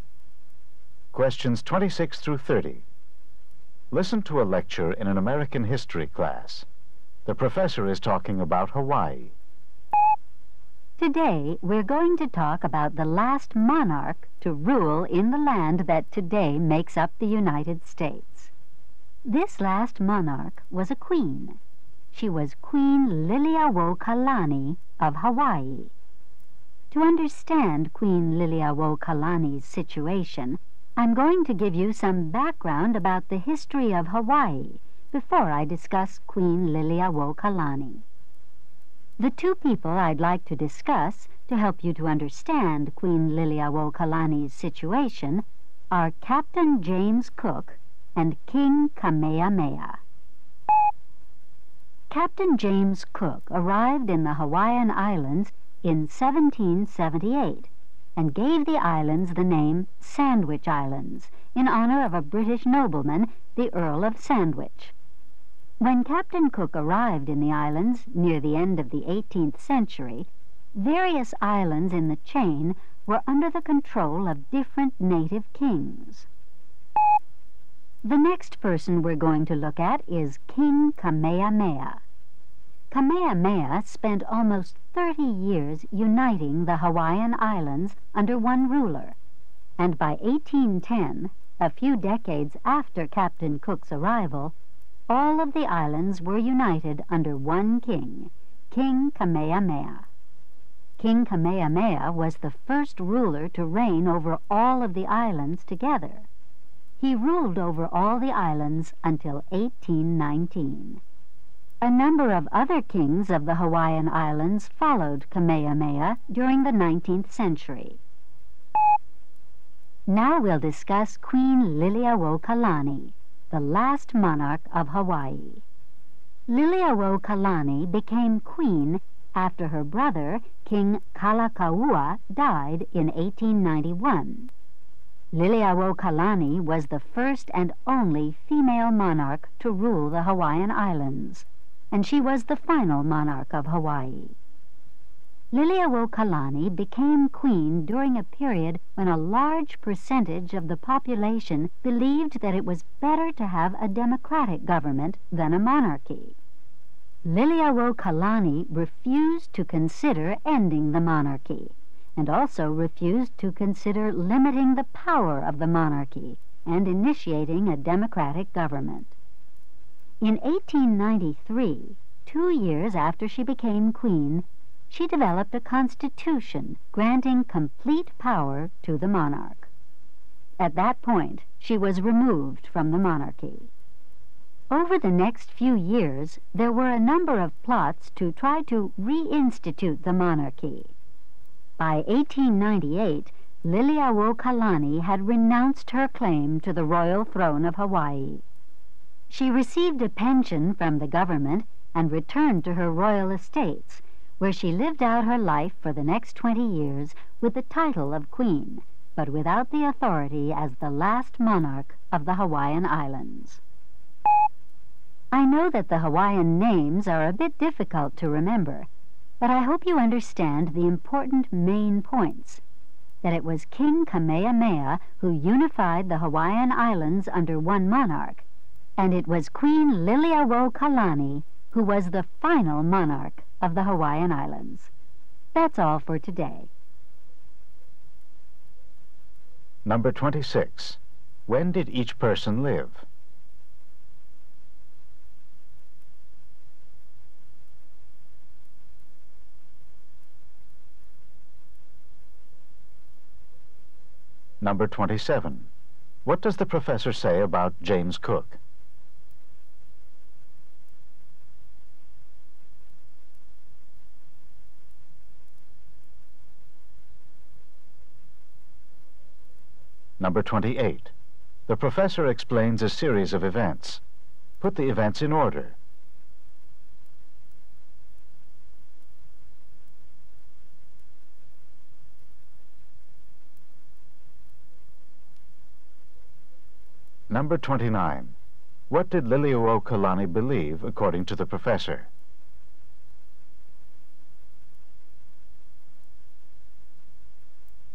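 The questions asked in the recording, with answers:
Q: What does the professor say about James Cook?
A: He arrived in 1778 and named them the Sandwich Islands

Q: What did Liliuokalani believe, according to the professor?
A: That the monarch should keep complete power, not a democracy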